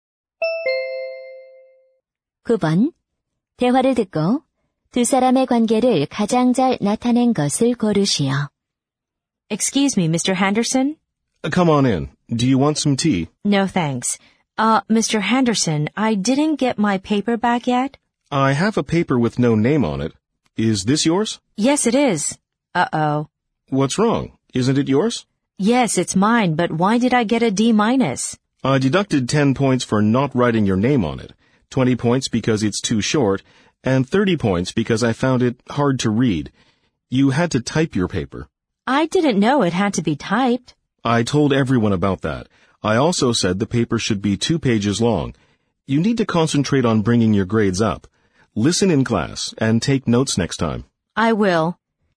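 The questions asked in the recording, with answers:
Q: 두 사람의 관계를 가장 잘 나타낸 것을 고르시오.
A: 교사와 학생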